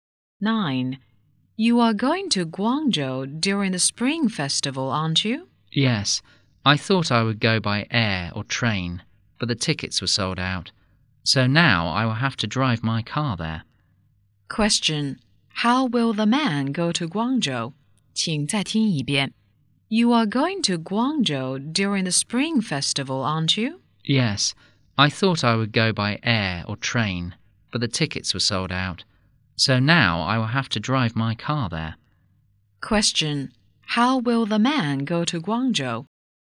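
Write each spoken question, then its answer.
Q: How will the man go to Guangzhou?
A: By car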